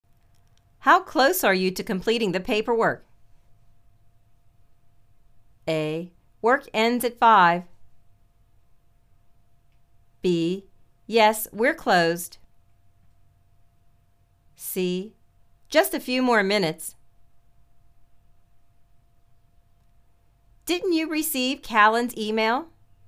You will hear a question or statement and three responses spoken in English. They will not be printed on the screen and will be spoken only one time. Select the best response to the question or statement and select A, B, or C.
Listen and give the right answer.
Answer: Just a few more minutes